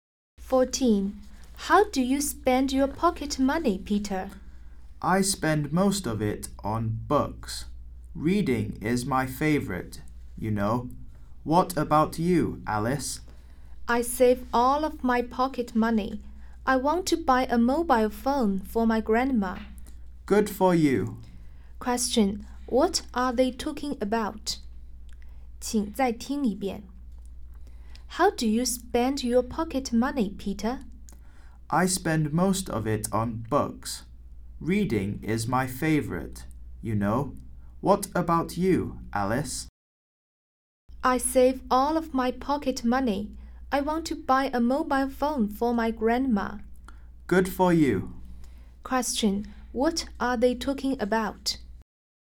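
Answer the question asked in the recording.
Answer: How they spend their pocket money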